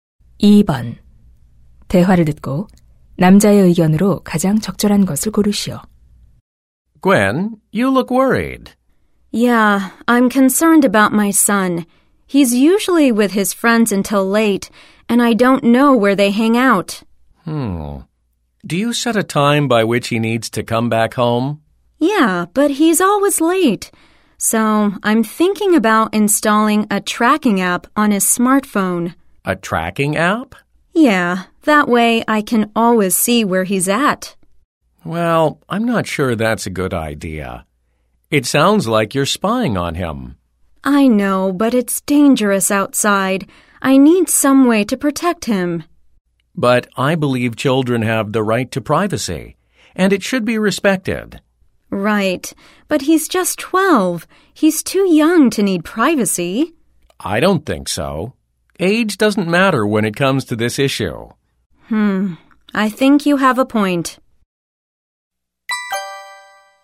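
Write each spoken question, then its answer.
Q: 대화를 듣고 남자의 의견으로 가장 적절한 것을 고르시오.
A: 아이들의 사생활은 존중되어야 한다.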